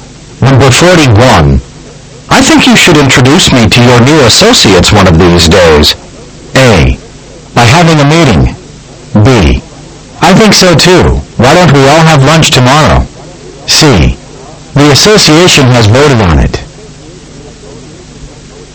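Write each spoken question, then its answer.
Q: I think you should introduce me to your new associates one of these days.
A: B: I think so too. Why don't we all have lunch tomorrow?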